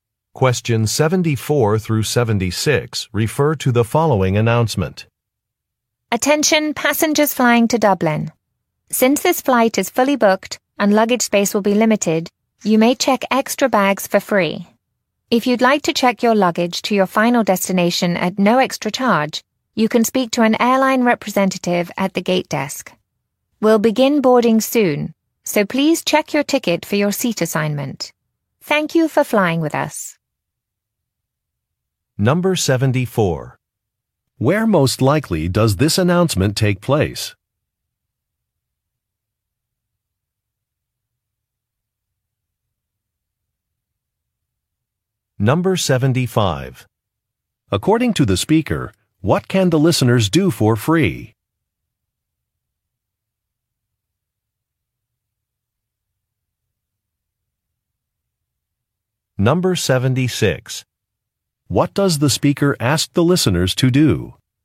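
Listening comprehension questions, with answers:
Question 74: Where most likely does this announcement take place?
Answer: At an airport

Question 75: According to the speaker, what can the listeners do for free?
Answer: Check extra luggage

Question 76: What does the speaker ask the listeners to do?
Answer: Look at a ticket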